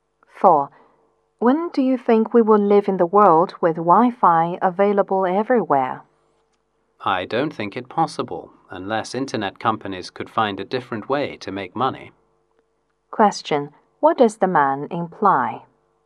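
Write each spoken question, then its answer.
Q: What does the man imply?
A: Wi-Fi everywhere is unlikely unless internet companies find a different way to make money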